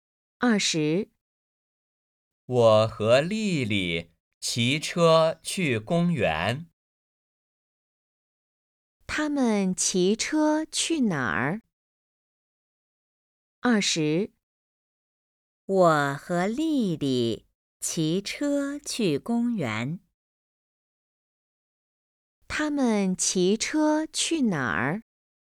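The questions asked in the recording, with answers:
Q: 他们骑车去哪儿?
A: 公园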